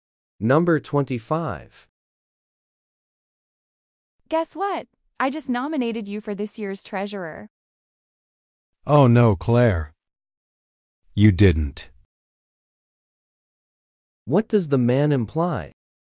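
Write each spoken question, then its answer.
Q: What does the man imply?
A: He didn't want to be nominated.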